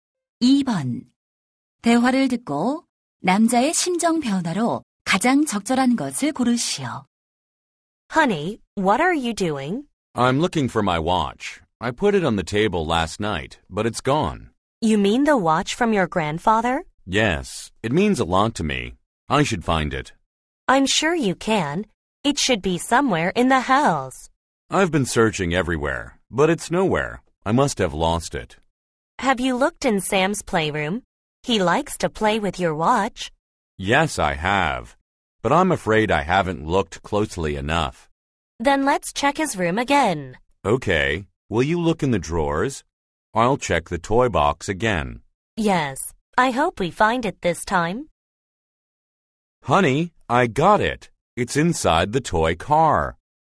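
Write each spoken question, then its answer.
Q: 대화를 듣고 남자의 심정 변화로 가장 적절한 것을 고르시오.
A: 걱정스러움 → 안도함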